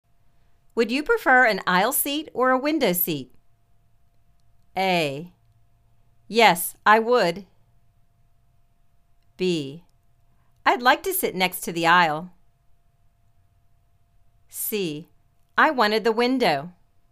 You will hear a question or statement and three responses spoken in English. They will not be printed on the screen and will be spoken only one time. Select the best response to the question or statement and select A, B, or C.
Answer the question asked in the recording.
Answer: I'd like to sit next to the aisle.